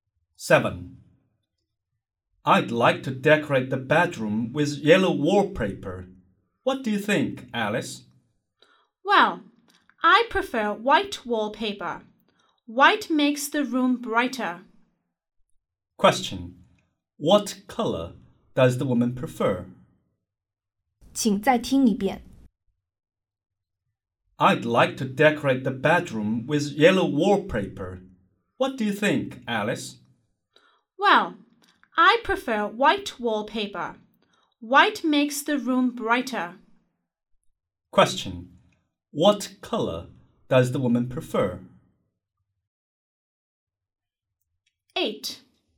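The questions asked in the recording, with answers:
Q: What color does the woman prefer?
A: White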